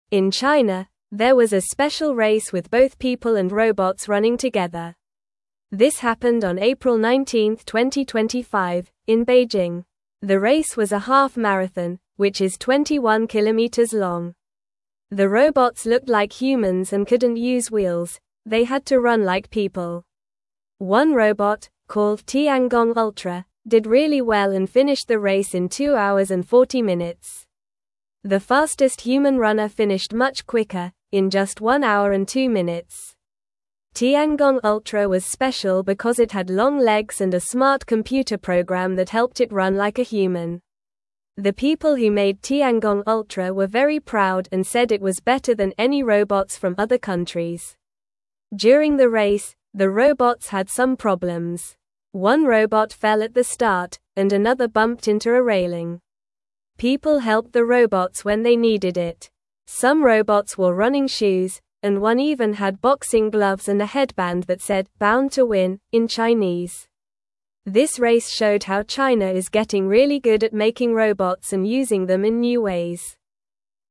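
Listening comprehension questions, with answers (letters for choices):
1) What kind of race was held in Beijing on April 19, 2025?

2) What is the name of the robot that ran in the race?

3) What special features did Tiangong Ultra have that helped it run?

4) What problems did some robots have during the race?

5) What did one robot wear that made it look unique during the race?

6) Where did the special race take place?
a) Shanghai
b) Guangzhou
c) Beijing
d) Hong Kong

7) What type of race was it?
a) Full marathon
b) Sprint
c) Relay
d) Half-marathon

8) What was the name of the robot that did well in the race?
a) Robo Runner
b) Speedy Bot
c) Fast Machine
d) Tiangong Ultra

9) What special feature did Tiangong Ultra have?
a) Wheels for fast running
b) A jetpack for flying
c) Long legs and a smart computer program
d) A big engine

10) What did some robots wear during the race?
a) Running shoes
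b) Skates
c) Sandals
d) Boots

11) What did one robot wear that said "Bound to Win"?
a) A cape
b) A headband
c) A helmet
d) A belt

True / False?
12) The slowest human runner completed the race in just one hour and two minutes.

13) The race took place on April 19, 2025, in Beijing.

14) There was a race in China where people and robots ran together.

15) All robots wore special running shoes and one had boxing gloves.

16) A robot named Tiangong Ultra completed the race in two hours and 40 minutes.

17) The race was a half-marathon, which is 21 kilometers long.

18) The race showed that China is becoming very good at making robots.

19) The robots in the race resembled humans and hopped on their legs.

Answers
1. A special race with people and robots running together.
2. The name of the robot is Tiangong Ultra.
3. Tiangong Ultra had long legs and a smart computer program.
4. Some robots fell or bumped into things during the race.
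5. One robot wore boxing gloves and a headband that said "Bound to Win."
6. c
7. d
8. d
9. c
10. a
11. b
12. False
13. True
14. True
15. False
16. True
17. True
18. True
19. False

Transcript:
In China, there was a special race with both people and robots running together. This happened on April 19, 2025, in Beijing. The robots looked like humans and couldn't use wheels; they had to run like people.
One robot, called Tiangong Ultra, did really well and finished the race in two hours and 40 minutes. The fastest human runner finished much quicker, in just one hour and two minutes. Tiangong Ultra was special because it had long legs and a smart computer program that helped it run like a human. The people who made Tiangong Ultra were very proud and said it was better than any robots from other countries.
During the race, the robots had some problems. One robot fell at the start, and another bumped into a railing. 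People helped the robots when they needed it. Some robots wore running shoes, and one even had boxing gloves and a headband that said "Bound to Win" in Chinese. This race showed how China is getting really good at making robots and using them in new ways.

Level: Level 2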